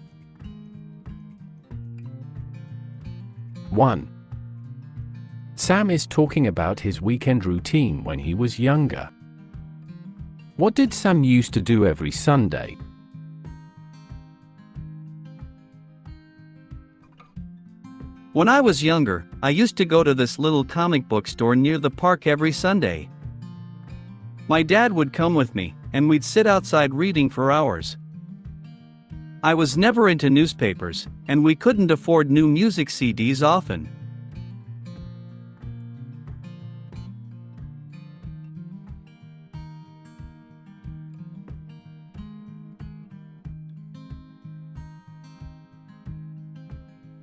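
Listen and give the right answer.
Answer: go to a comic book store near the park and read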